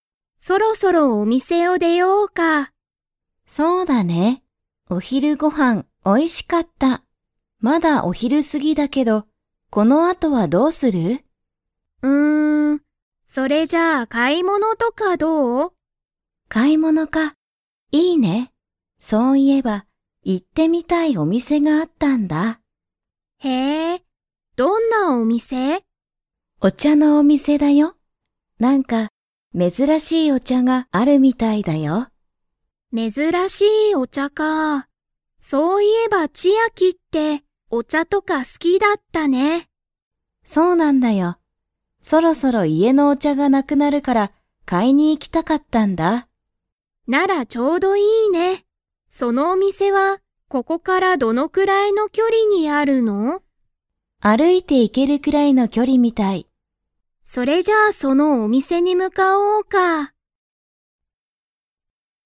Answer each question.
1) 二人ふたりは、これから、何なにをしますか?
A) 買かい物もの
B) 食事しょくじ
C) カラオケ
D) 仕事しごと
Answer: 買かい物もの

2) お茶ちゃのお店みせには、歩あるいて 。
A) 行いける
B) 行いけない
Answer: 行いける

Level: Level 4

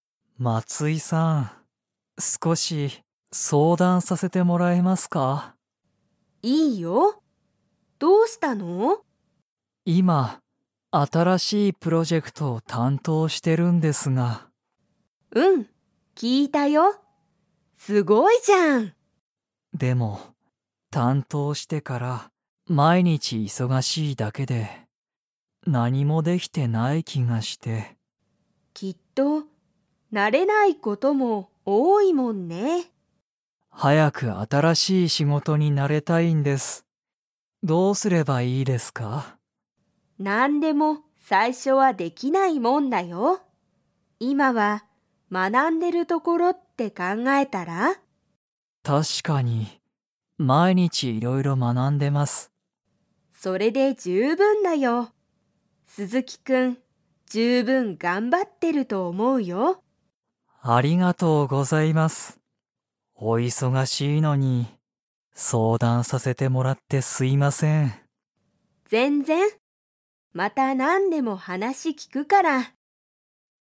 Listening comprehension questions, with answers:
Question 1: 鈴木すずきさんは今いま、 を担当たんとうしている。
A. メール対応たいおう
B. 新あたらしいプロジェクト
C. 難むずかしいお客きゃくさん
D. 昔むかしの音楽おんがく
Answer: 新あたらしいプロジェクト

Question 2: 鈴木すずきさんは、今いま、毎日まいにち忙いそがしいですか?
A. はい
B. いいえ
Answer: はい

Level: Level 4

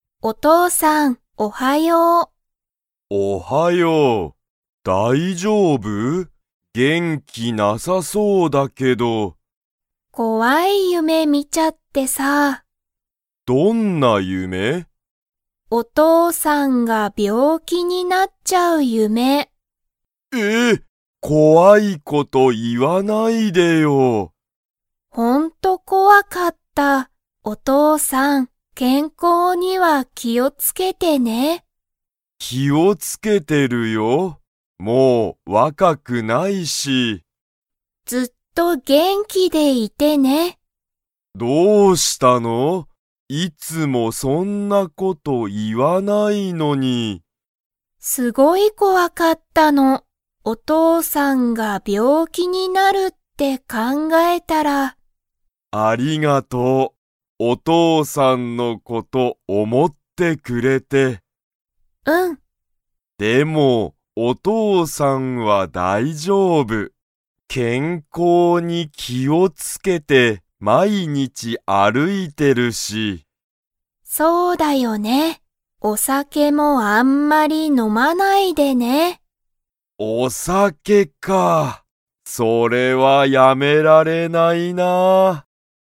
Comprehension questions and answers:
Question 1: ユイは 夢ゆめを見みた。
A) 怖こわい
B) 楽たのしい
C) 新あたらしい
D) 面白おもしろい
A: 怖こわい

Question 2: お父とうさんはお酒さけをやめられますか?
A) はい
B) いいえ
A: いいえ

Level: Level 3

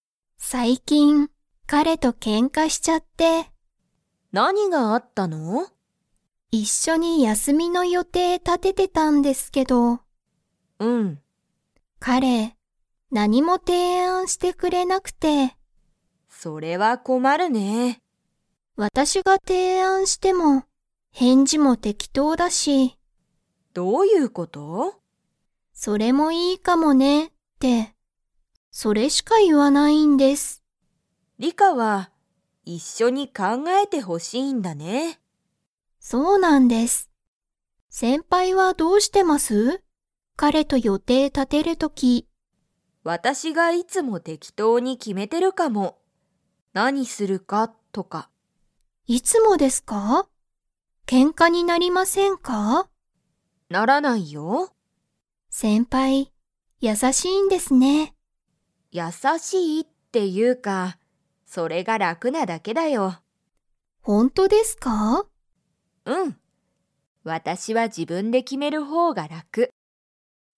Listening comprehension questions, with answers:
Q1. の予定よていを立たてているとき、リカは彼かれとけんかした。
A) 旅行りょこう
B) 勉強べんきょう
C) 仕事しごと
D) 休やすみ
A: 休やすみ

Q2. ユウコは、自分じぶんで予定よていを決きめるのは楽らくだと思おもっていますか?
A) はい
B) いいえ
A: はい

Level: Level 4

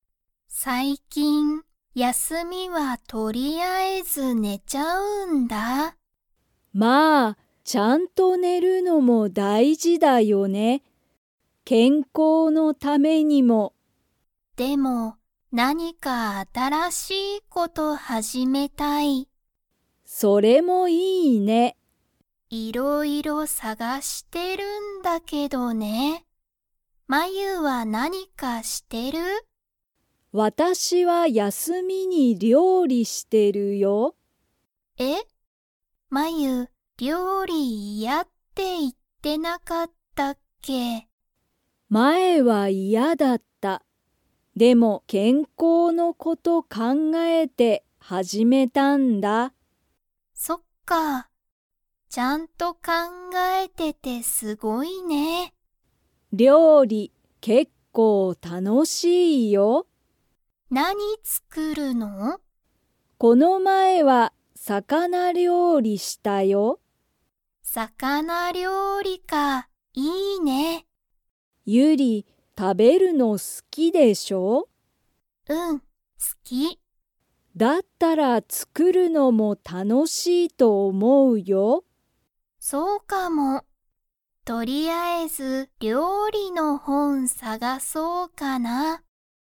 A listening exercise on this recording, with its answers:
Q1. まゆは、休やすみに何なにをしてますか?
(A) 料理りょうり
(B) 仕事しごと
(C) 勉強べんきょう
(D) 電話でんわ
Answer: 料理りょうり

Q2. ゆりは食たべるのが 。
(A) 好すきだ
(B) 好すきじゃない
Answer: 好すきだ

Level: Level 3

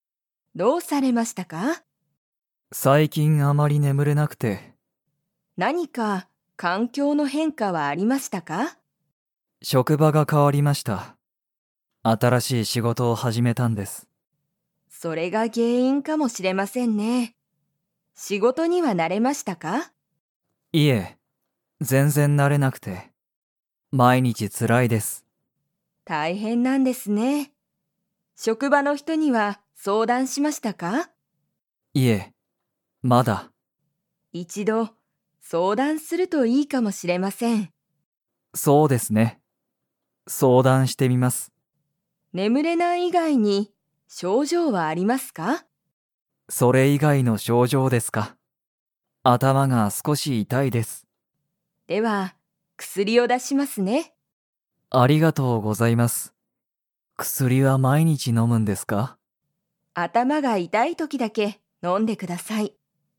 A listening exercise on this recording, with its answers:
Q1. 鈴木(すずき)さんは、 が変(か)わった。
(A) 職場(しょくば)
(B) 相談(そうだん)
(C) 原因(げんいん)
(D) 症状(しょうじょう)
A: 職場(しょくば)

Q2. 鈴木(すずき)さんは、頭(あたま)が少(すこ)し痛(いた)いですか?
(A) はい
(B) いいえ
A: はい

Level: Level 4

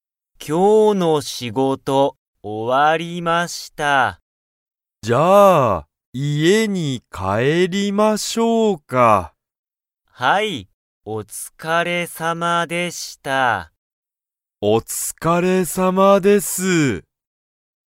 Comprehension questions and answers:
森(もり)さんは、家(いえ)に帰(かえ)りますか?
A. はい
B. いいえ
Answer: はい

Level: Level 1

